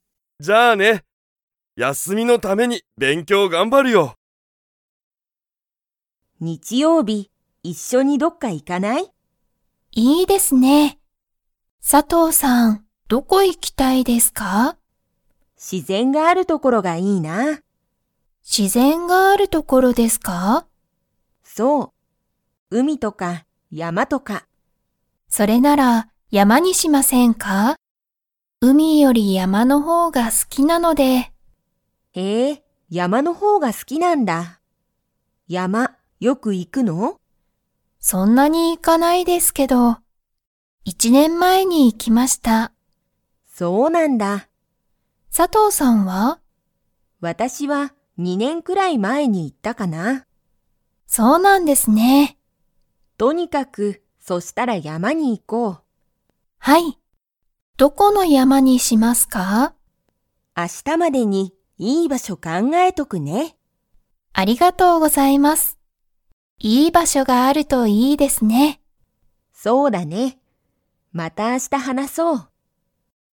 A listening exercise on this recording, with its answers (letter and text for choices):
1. 佐藤(さとう)さんは、____がいい。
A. 自然(しぜん)がある所(ところ)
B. 山(やま)より海(うみ)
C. よく行(い)く所(ところ)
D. 山(やま)がない所(ところ)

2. 田中(たなか)さんはよく山(やま)に行(い)きますか?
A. はい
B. いいえ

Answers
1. A. 自然(しぜん)がある所(ところ)
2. B. いいえ

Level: Level 2